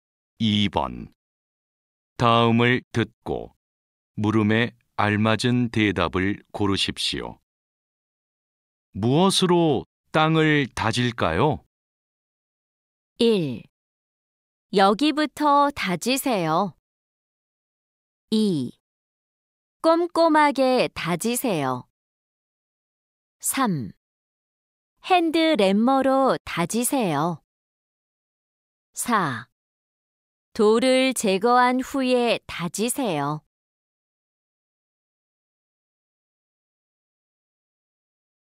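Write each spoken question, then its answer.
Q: 무엇으로 땅을 다질까요?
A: 3: 핸드램머로 다지세요.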